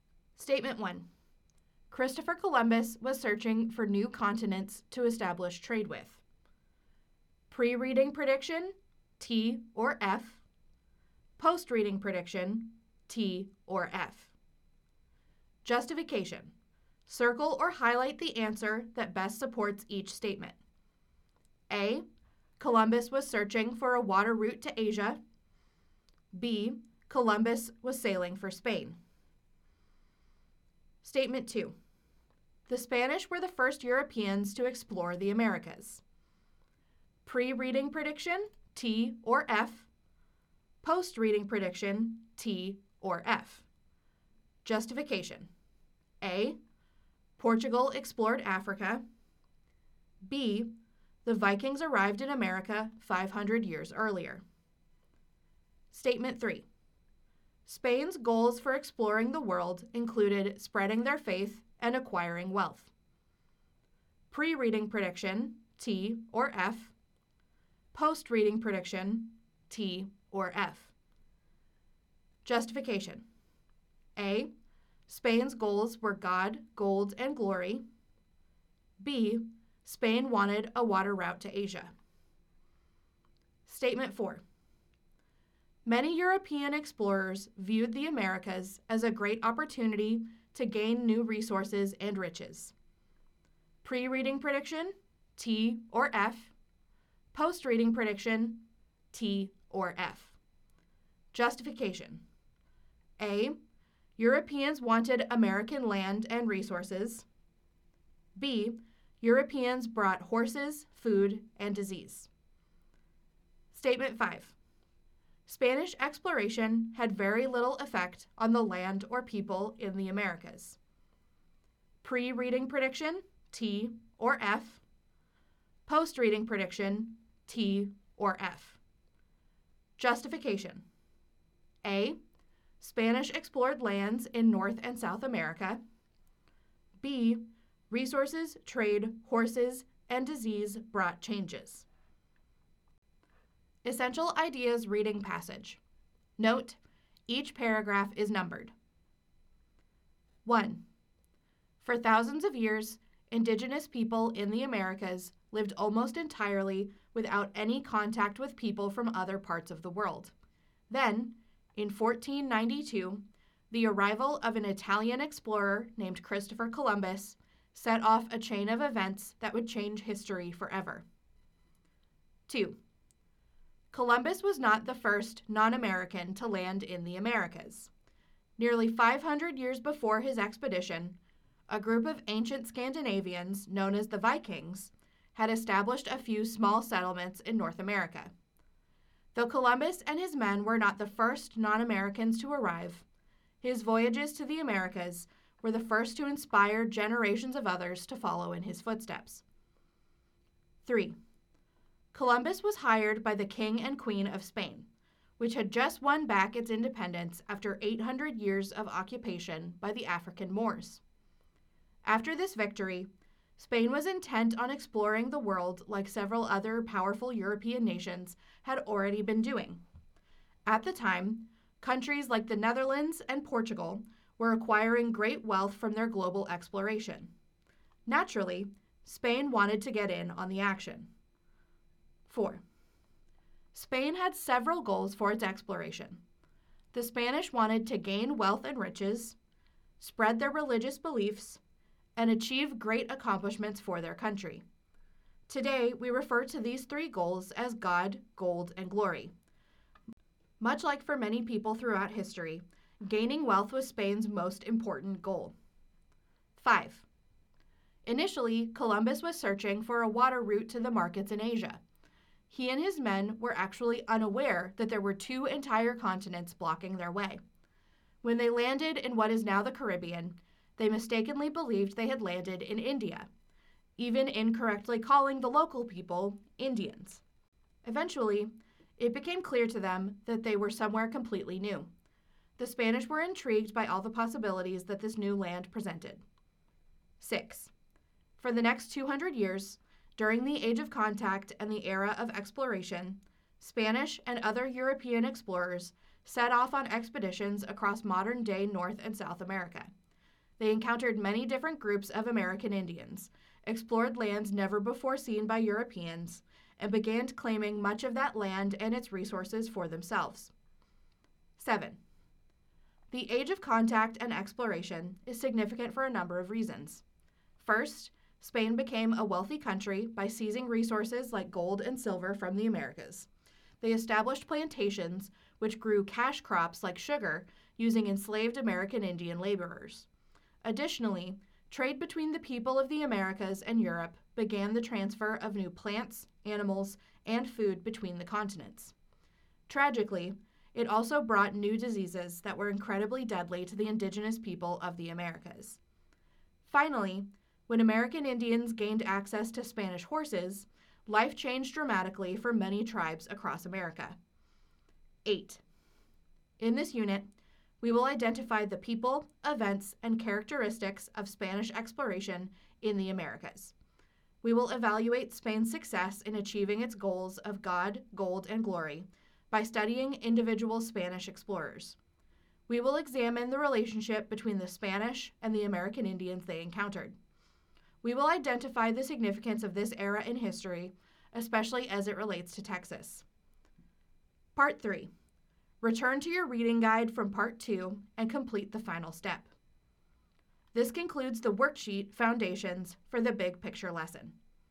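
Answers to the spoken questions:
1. False
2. False
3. True
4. True
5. False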